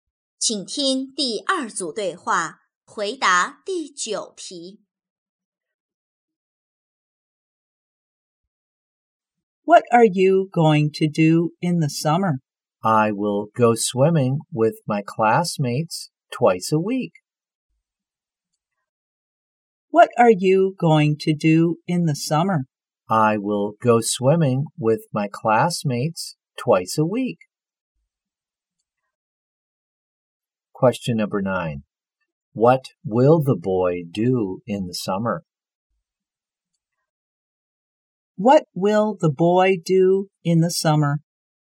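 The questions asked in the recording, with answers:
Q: What will the boy do in the summer?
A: Go swimming with his classmates twice a week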